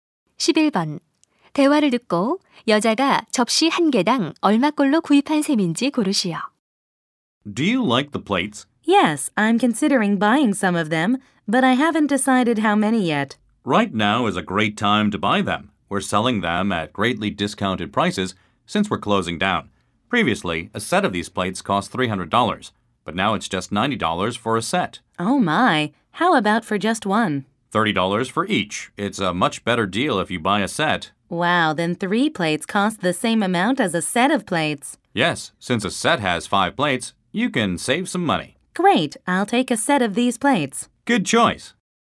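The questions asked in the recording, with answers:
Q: 대화를 듣고 여자가 접시 한 개당 얼마꼴로 구입한 셈인지 고르시오.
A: 18달러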